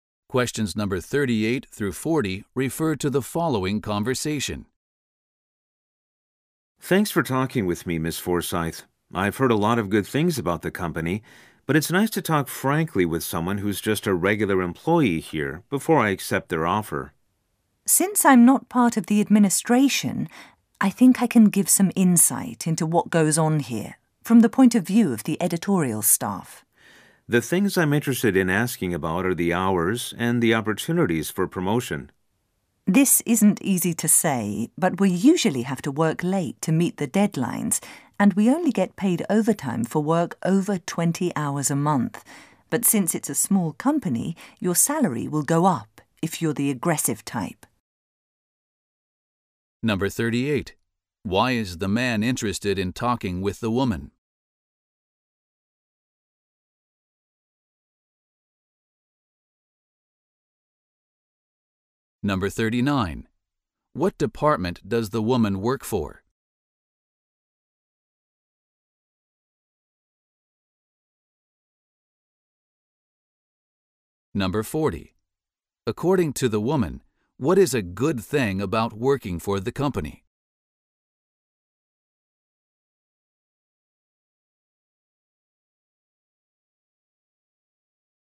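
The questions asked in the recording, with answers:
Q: Why is the man interested in talking with the woman?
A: To hear a regular employee's frank view before accepting the job offer

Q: What department does the woman work for?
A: The editorial department

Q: According to the woman, what is a good thing about working for the company?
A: Your salary goes up if you are aggressive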